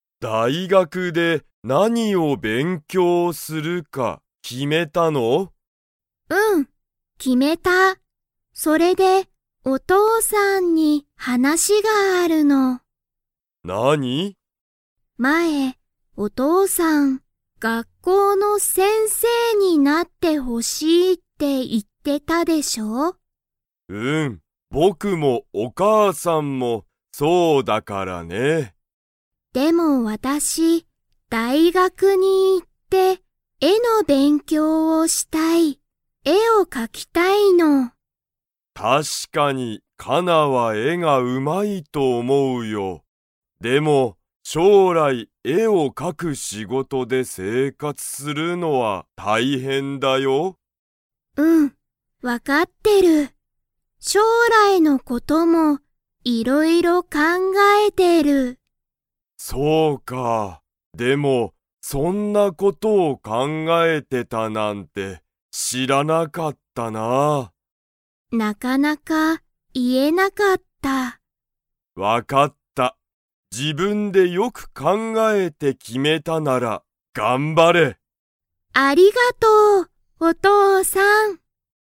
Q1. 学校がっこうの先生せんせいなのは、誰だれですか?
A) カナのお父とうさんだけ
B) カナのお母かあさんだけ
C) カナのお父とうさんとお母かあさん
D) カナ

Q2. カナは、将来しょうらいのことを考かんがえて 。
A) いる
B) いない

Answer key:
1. C) カナのお父とうさんとお母かあさん
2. A) いる

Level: Level 3

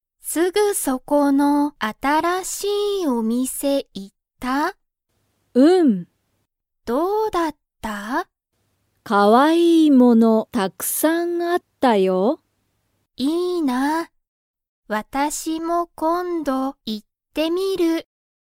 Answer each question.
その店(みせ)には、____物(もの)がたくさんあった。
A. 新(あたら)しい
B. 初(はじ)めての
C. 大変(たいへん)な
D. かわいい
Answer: D. かわいい

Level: Level 1

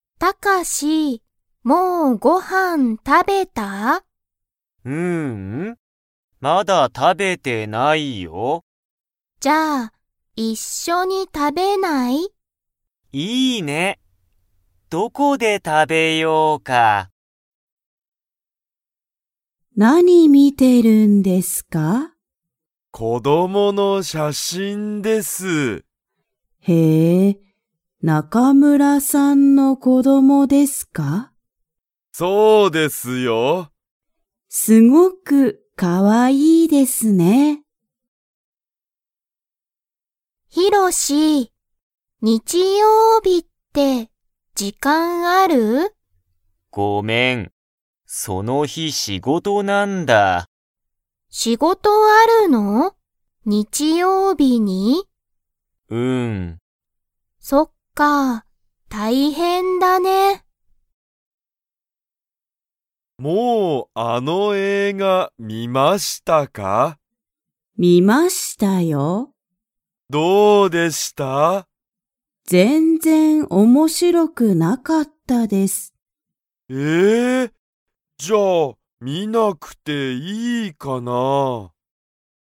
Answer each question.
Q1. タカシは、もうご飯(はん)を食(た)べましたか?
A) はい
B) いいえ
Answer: B) いいえ

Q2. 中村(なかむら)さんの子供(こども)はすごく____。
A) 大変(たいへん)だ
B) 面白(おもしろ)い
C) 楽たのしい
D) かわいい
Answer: D) かわいい

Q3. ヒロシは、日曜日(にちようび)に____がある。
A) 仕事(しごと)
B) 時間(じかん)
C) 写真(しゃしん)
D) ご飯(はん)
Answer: A) 仕事(しごと)

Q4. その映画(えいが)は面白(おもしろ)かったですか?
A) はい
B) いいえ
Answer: B) いいえ

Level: Level 1

